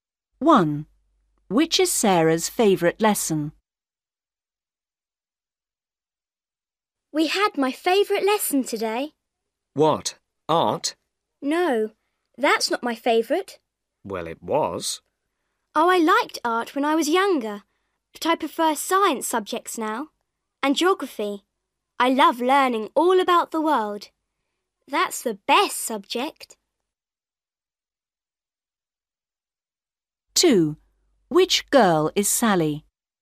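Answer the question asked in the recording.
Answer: Geography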